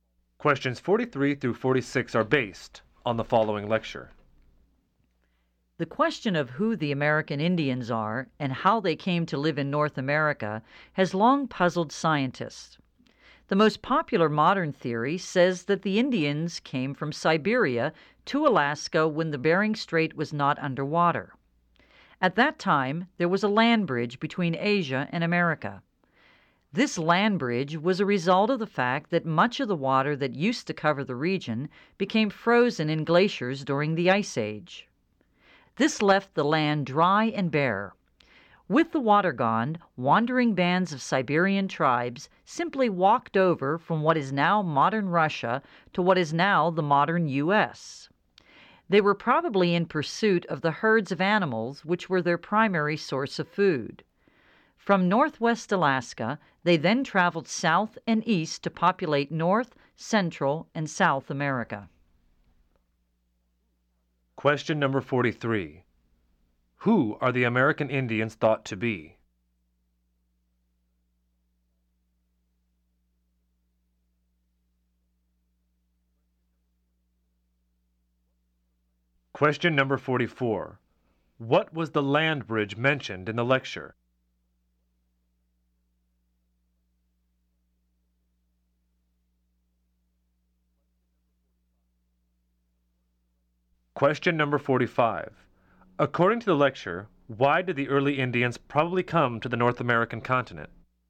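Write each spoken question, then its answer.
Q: Who are the American Indians thought to be?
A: Descendants of Siberian tribes who came from Asia

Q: What was the land bridge mentioned in the lecture?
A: Dry land between Asia and America across the Bering Strait, exposed when water froze in glaciers during the Ice Age

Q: According to the lecture, why did the early Indians probably come to the North American continent?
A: They were following the herds of animals they hunted for food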